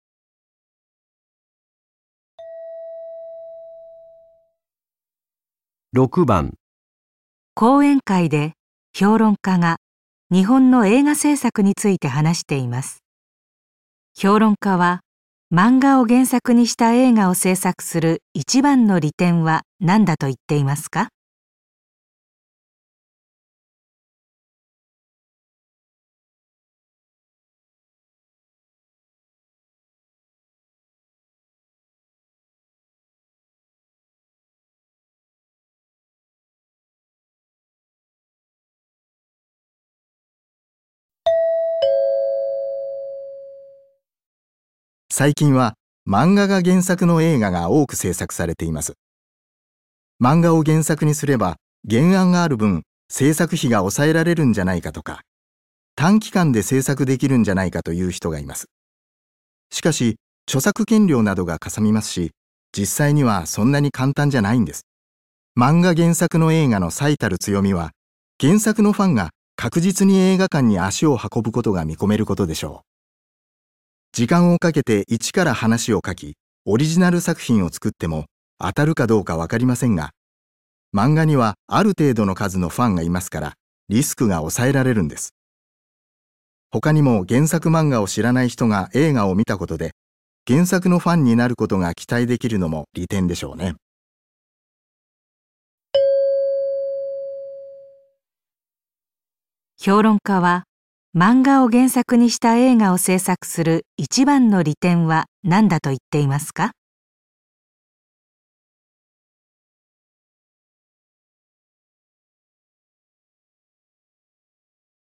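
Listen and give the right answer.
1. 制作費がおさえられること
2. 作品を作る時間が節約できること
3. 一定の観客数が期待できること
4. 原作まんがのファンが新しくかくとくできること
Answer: 3. 一定の観客数が期待できること

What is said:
男:最近は漫画が原作の映画が多く制作されています。 漫画を原作にすれば原案がある分、 製作費が抑えら れるんじゃないのとか、短期間で制作できるんじゃないか、という人がいます。 しかし、 著作権料などが嵩みま すし、実際にはそんなに簡単じゃないんです。 漫画原作の映画の最たる強みは原作のファンが確実に映画館に足を運ぶことが見込めることでしょう。時間をかけて一から話を書き、オリジナル作品を作っても当たるかど うかわかりませんが、漫画にはある程度の数のファンがいますからリスクが抑えられるんです。 他にも原作漫 画を知らない人が映画を見たことで原作のファンになることが期待できるのも利点でしょうね。
評論家は漫画を原作にした映画を制作する一番の利点は何だと言っていますか。

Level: N1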